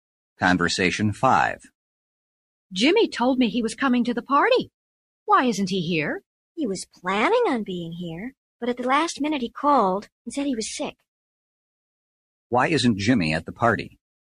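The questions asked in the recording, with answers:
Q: Why isn't Jimmy at the party?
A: He was sick.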